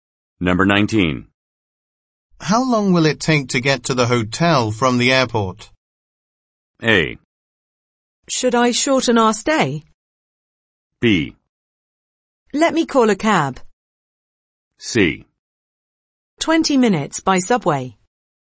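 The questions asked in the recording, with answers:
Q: How long will it take to get to the hotel from the airport?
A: C: 20 minutes by subway.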